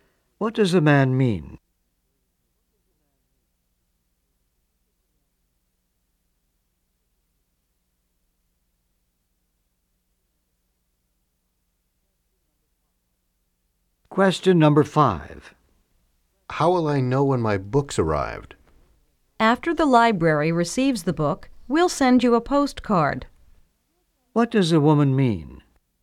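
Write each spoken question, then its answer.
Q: What does the woman mean?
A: The library will send a postcard when the books arrive.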